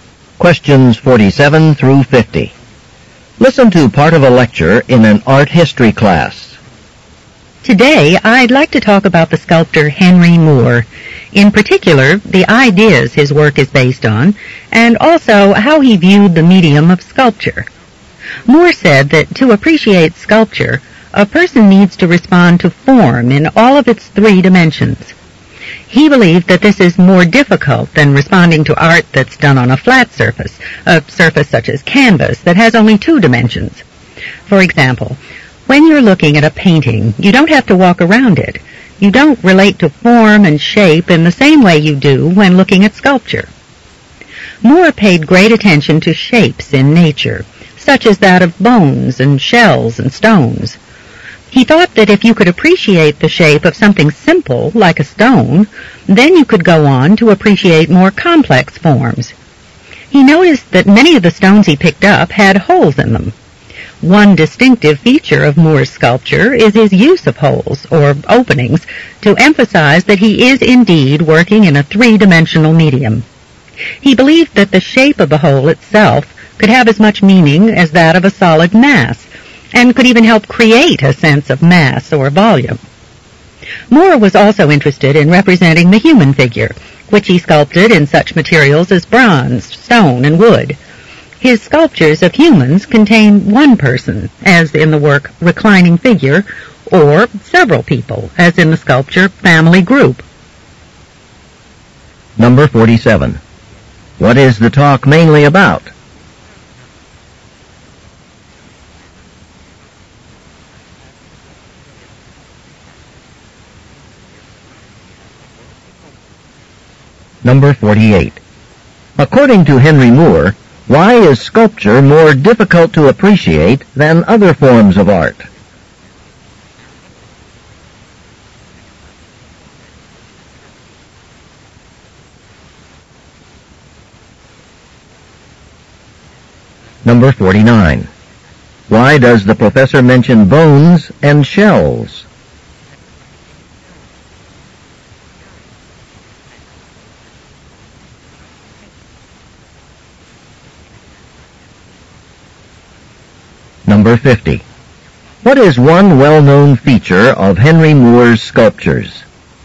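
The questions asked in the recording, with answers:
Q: What is the talk mainly about?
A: Henry Moore's sculpture and the ideas behind it.

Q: According to Henry Moore, why is sculpture more difficult to appreciate than other forms of art?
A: It must be appreciated in three dimensions.

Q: Why does the professor mention bones and shells?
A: They are natural shapes Moore paid attention to.

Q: What is one well-known feature of Henry Moore's sculptures?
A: His use of holes, or openings.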